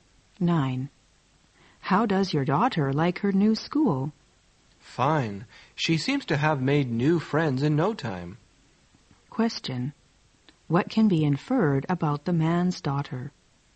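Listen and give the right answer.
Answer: She made new friends quickly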